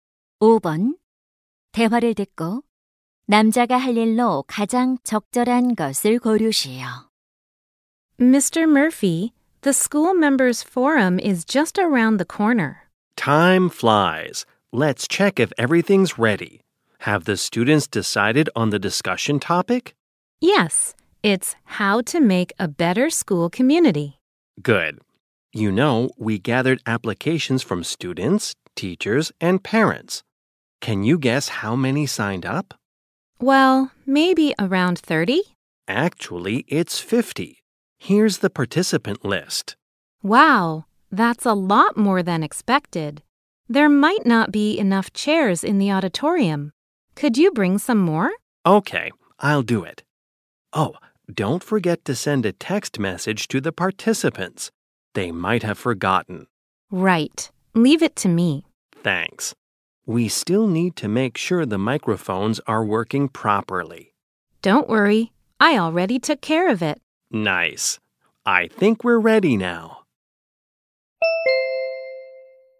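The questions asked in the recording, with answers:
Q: 대화를 듣고 남자가 할 일로 가장 적절한 것을 고르시오.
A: 강당에 의자 더 가져오기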